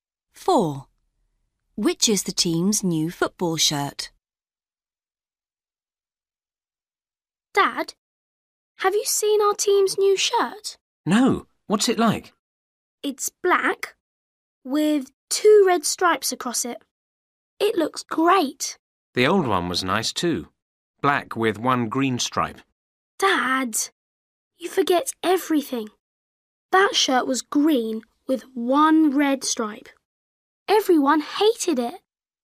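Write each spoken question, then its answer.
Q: Which is the team's new football shirt?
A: black with 2 red stripes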